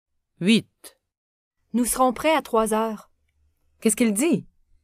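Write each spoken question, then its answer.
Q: Qu'est-ce qu'il dit?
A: Il dit qu'ils seront prêts à 3 heures.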